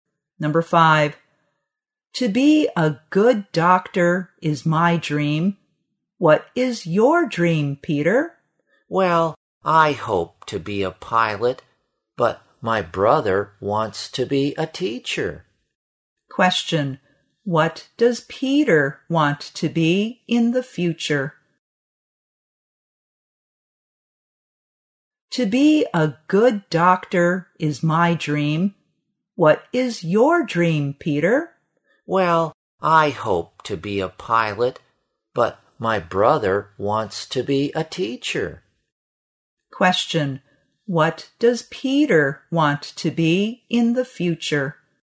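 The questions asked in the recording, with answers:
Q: what does Peter want to be in the future?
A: A pilot.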